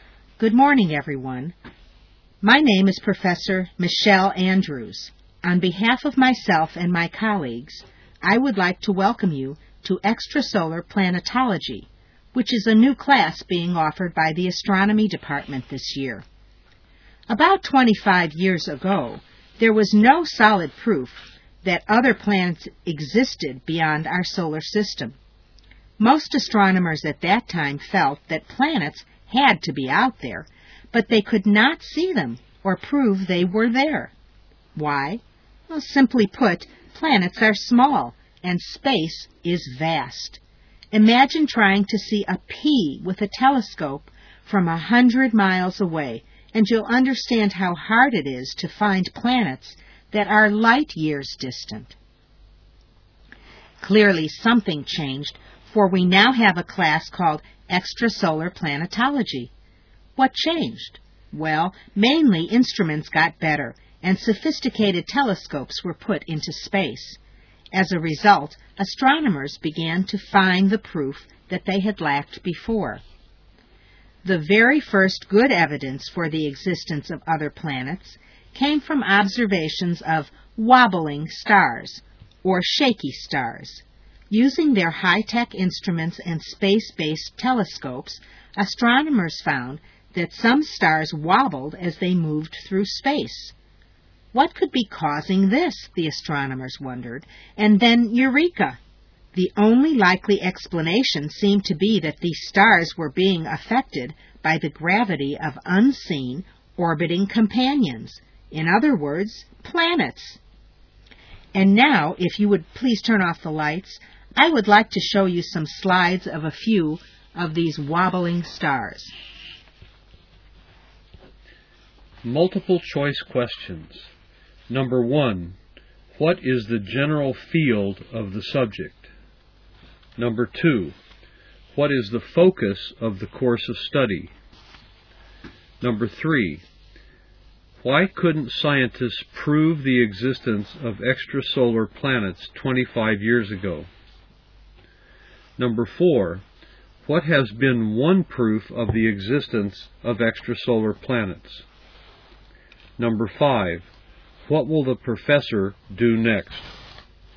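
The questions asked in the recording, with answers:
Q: what is the general field of the subject?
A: Astronomy

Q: what is the focus of the course of study?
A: Planets beyond our solar system (extrasolar planets)

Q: why couldn't scientists prove the existence of extrasolar planets 25 years ago?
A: Planets are small and space is vast; their instruments weren't good enough

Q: what has been one proof of the existence of extrasolar planets?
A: Stars that wobble as they move through space

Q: what will the professor do next?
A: Show slides of wobbling stars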